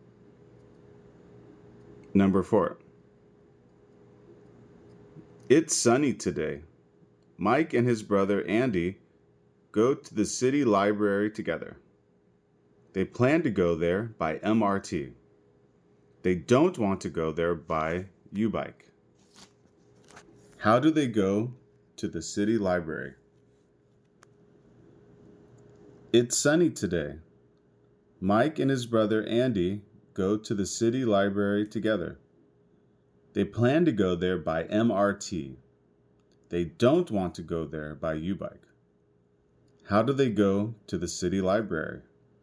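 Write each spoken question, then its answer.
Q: How do they go to the city library?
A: By MRT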